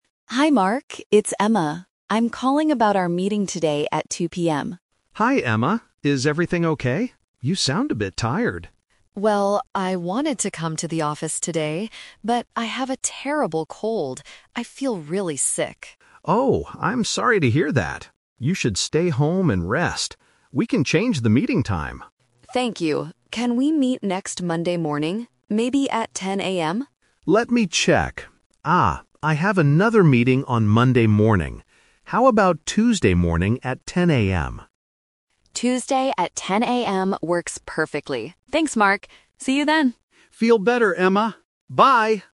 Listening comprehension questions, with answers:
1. Why can't Emma go to the office today?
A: She has a terrible cold.

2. When did they originally plan to meet?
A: Today at 2:00 PM

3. When will they have the meeting now?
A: Tuesday morning

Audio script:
Emma: Hi, Mark. It's Emma. I'm calling about our meeting today at 2:00 PM.
Mark: Hi, Emma. Is everything okay? You sound a bit tired.
Emma: Well, I wanted to come to the office today, but I have a terrible cold. I feel really sick.
Mark: Oh, I'm sorry to hear that. You should stay home and rest. We can change the meeting time.
Emma: Thank you. Can we meet next Monday morning? Maybe at 10:00 AM?
Mark: Let me check... ah, I have another meeting on Monday morning. How about Tuesday morning at 10:00 AM?
Emma: Tuesday at 10:00 AM works perfectly. Thanks, Mark. See you then!